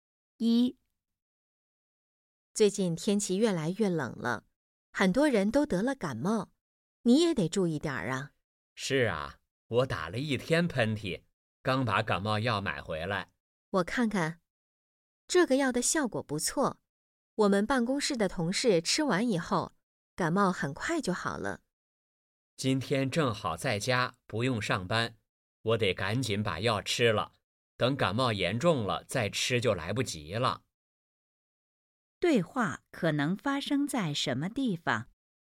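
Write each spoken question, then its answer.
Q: 对话可能发生在什么地方?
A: 家里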